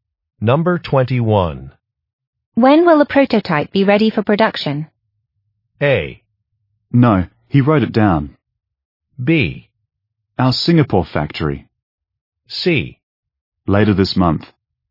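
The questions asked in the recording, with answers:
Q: When will a prototype be ready for production?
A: C: Later this month.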